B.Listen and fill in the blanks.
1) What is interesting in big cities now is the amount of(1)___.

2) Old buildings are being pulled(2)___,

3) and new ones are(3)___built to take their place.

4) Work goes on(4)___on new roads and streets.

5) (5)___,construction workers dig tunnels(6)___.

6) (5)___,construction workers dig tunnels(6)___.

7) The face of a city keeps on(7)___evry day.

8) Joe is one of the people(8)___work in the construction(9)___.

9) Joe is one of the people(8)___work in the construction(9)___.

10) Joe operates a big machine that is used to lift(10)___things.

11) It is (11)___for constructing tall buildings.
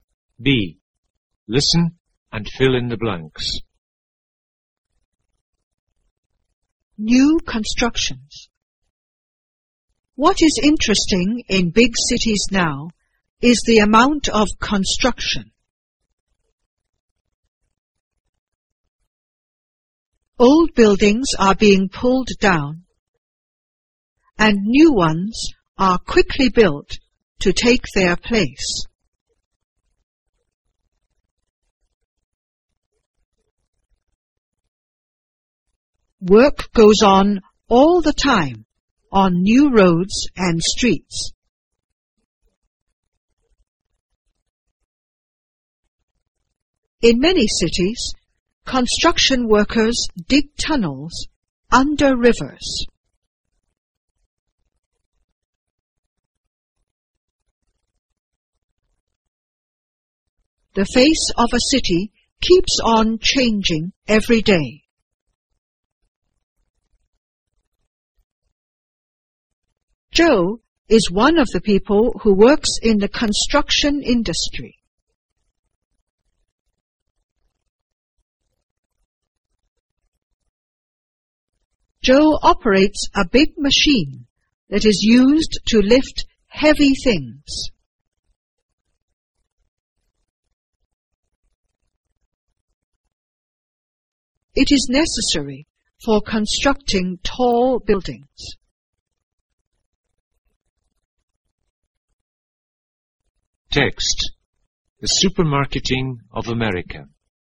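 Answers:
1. construction
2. down
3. quickly
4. all the time
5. In many cities
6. under rivers
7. changing
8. who
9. industry
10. heavy
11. necessary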